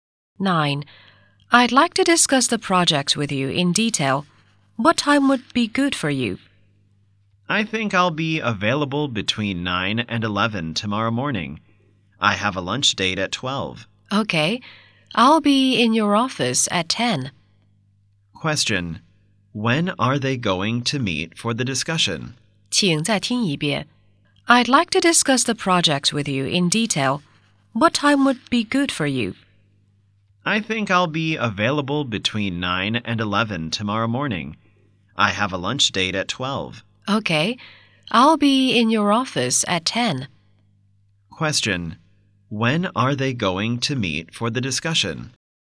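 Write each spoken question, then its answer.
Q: When are they going to meet for the discussion?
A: At 10 tomorrow morning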